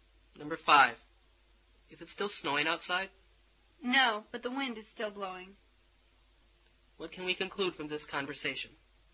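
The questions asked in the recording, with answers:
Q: What can we conclude from this conversation?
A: It has stopped snowing, but it is still windy.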